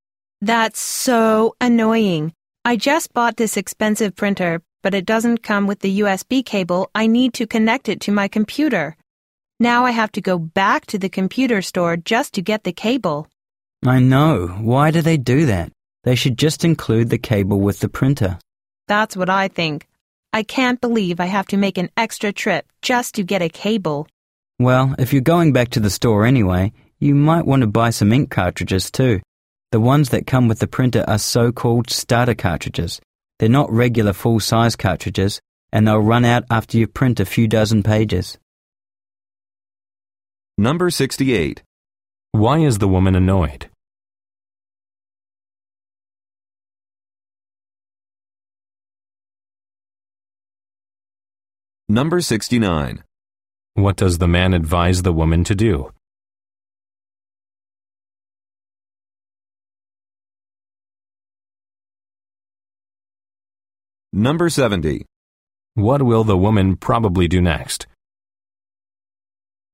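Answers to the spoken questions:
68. Her new printer did not come with the USB cable she needs
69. Buy some ink cartridges too
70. Go back to the computer store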